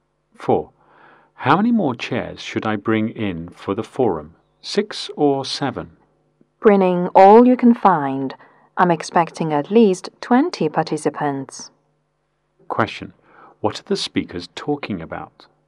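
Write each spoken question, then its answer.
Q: What are the speakers talking about?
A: How many chairs to bring in for the forum.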